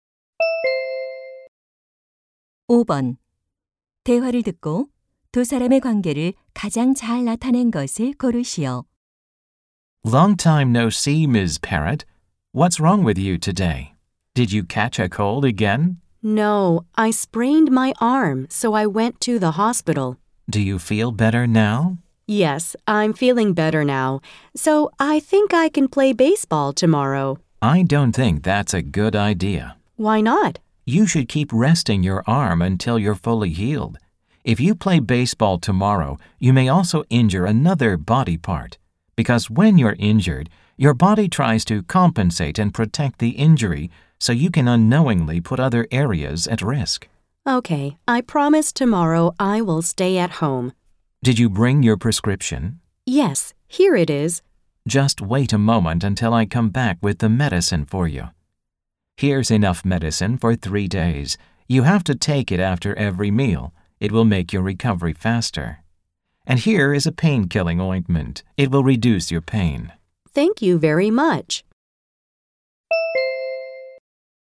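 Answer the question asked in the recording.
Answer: 약사 - 손님(환자)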